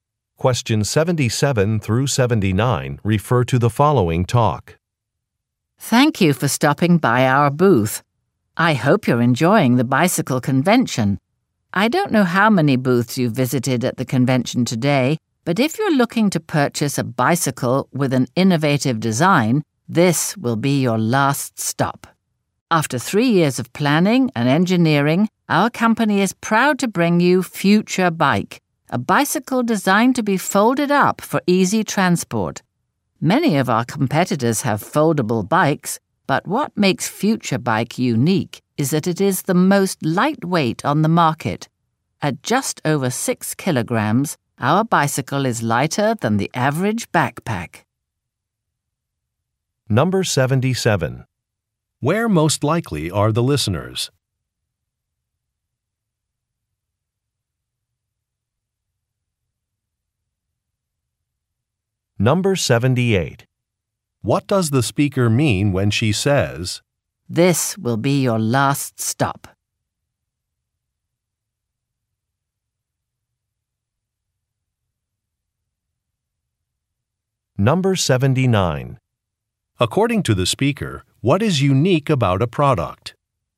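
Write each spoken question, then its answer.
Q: Where most likely are the listeners?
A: At a bicycle convention

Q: What does the speaker mean when she says,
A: Listeners won't need to look elsewhere for an innovative bicycle

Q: According to the speaker, what is unique about a product?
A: It is the most lightweight on the market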